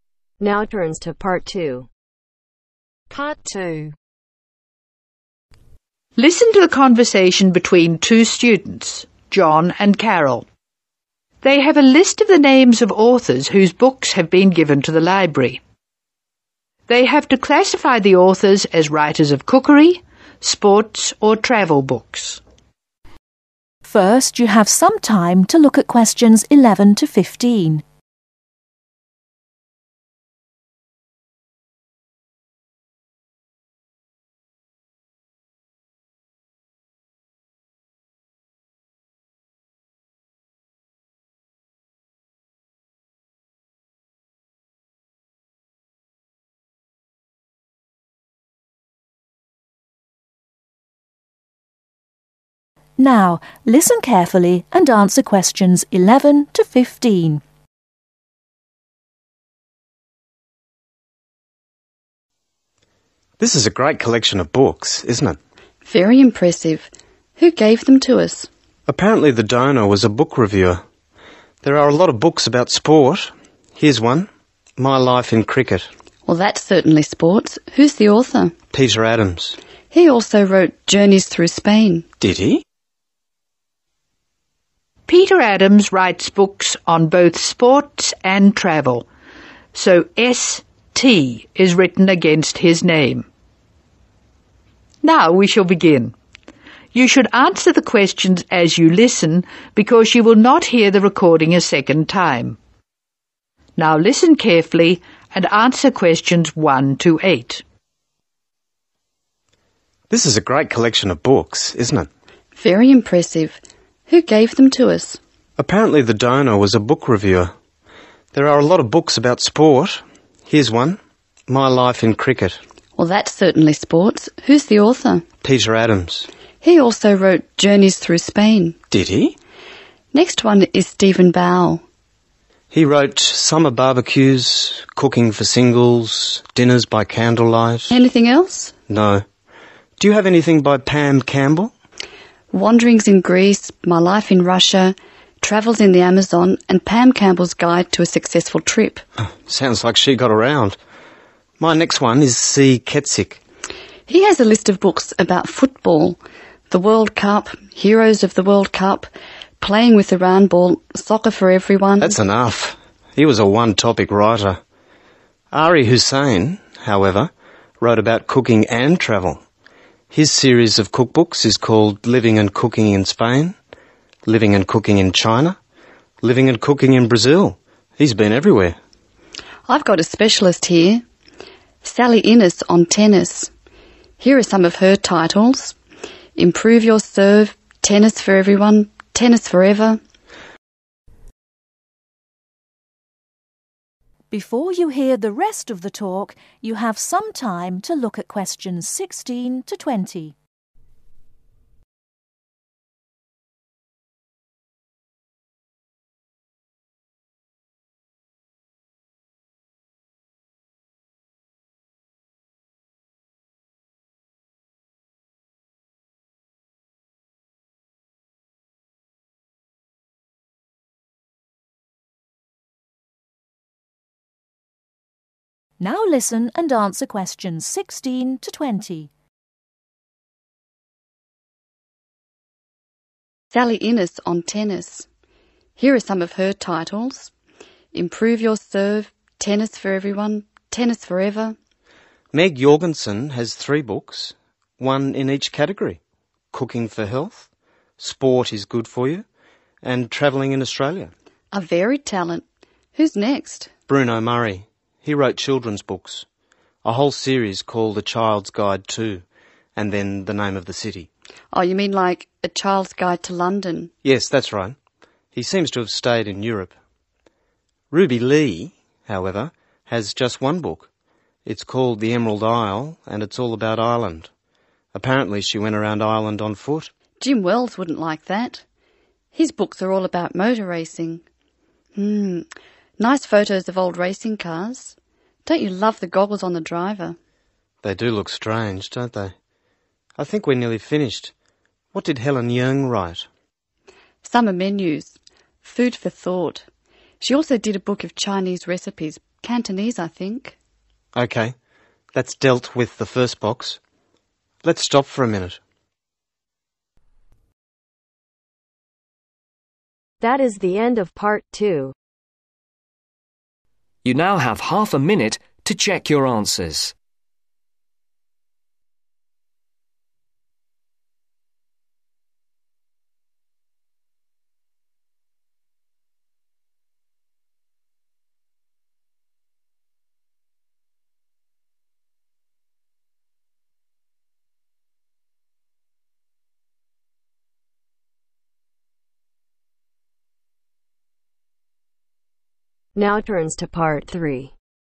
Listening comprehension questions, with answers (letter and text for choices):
Write C for cookery, S for Sports and T for Travel.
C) Cookery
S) Sports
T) Travel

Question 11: Stephen Bau (11)............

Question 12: Pam Campbell (12)............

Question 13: C. Kezik (13)............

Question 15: Sally Ines (15)............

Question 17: Bruno Murray (17)............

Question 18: Ruby Lee (18)............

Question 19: Jim wells (19)............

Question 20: Helen Yeung (20)............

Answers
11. C) Cookery
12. T) Travel
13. S) Sports
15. S) Sports
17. T) Travel
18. T) Travel
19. S) Sports
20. C) Cookery